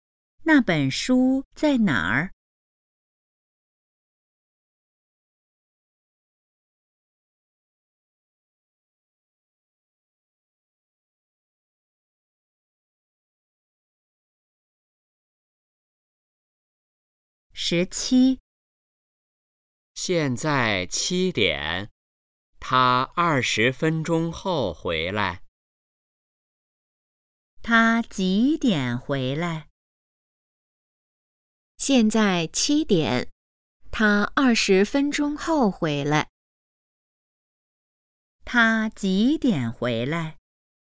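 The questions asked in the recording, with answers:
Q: 他几点回来?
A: 七点二十分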